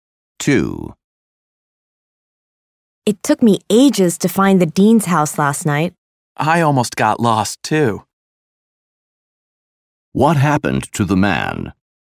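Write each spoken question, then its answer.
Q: What happened to the man?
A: He almost got lost finding the dean's house.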